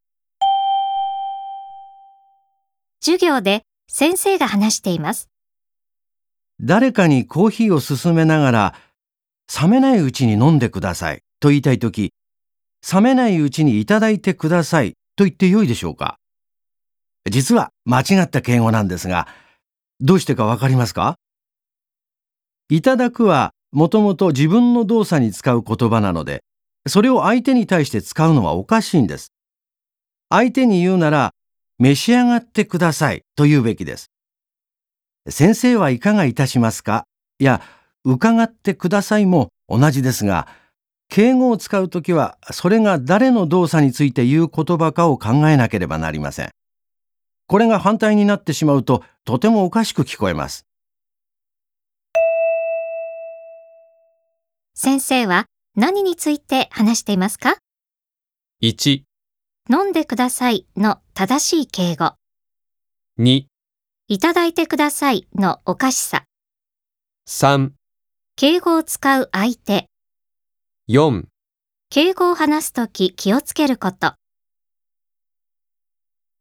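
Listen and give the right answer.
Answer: 4: 敬語を話すとき気をつけること。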